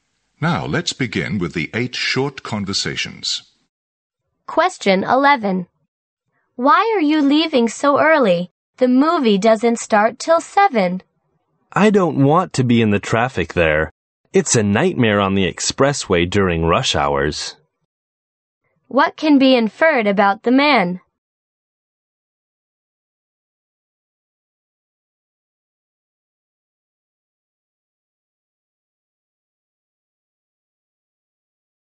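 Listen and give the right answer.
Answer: He wants to avoid the rush-hour traffic on the expressway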